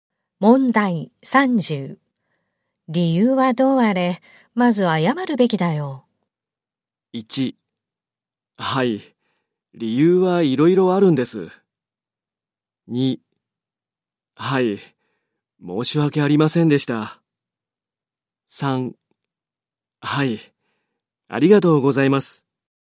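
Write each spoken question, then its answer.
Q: 理由はどうあれ、まず謝るべきだよ。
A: 2: はい、申し訳ありませんでした。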